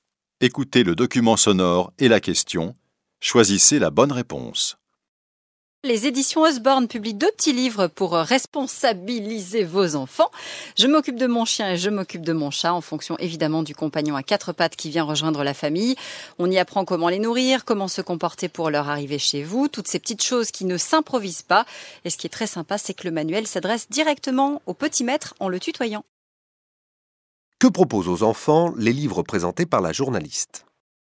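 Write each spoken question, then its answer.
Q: Que proposent aux enfants les livres présentés par la journaliste ?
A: Des conseils pour s'occuper de leur chien ou de leur chat (comment les nourrir, comment se comporter à leur arrivée).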